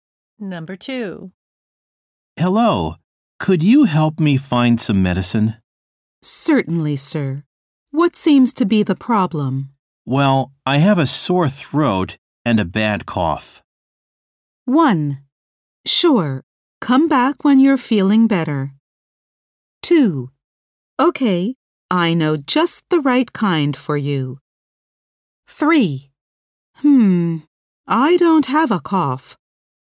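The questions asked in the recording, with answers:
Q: Well, I have a sore throat and a bad cough.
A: 2: Okay, I know just the right kind for you.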